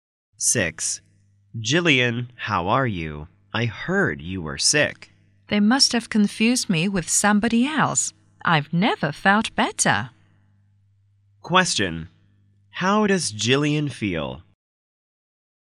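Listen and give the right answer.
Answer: Very well; she isn't sick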